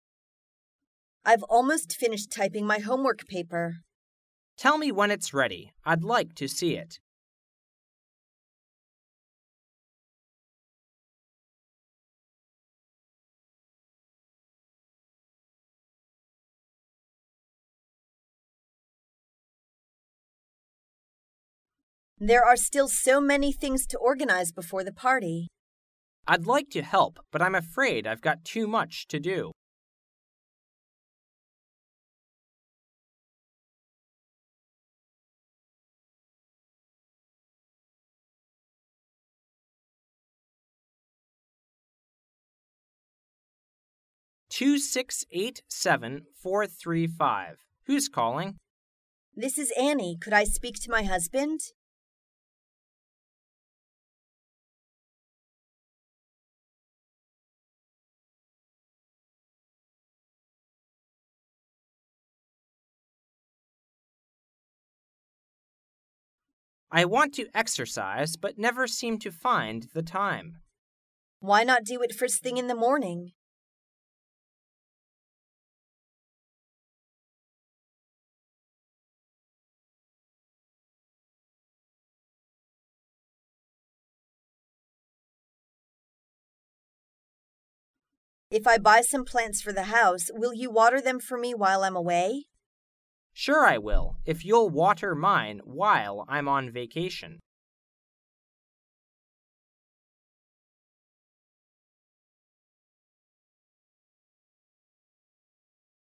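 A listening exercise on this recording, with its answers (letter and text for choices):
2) What is the woman going to have?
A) Some.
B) A party.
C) Many things.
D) A dinner.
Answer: B) A party.

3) What's the woman's husband's telephone number?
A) 2678435.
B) 2687345.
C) 2687543.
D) 2687435.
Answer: D) 2687435.

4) What does the woman suggest?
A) Exercising just after getting up.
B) Eating something good for breakfast.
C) Buying the next larger size.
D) Not exercising so many times a day.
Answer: A) Exercising just after getting up.

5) What will the man do for the woman?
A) Bring her some water.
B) Buy her some plants.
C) Water her plants while she is away.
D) Water her plants while he is on vacation.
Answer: C) Water her plants while she is away.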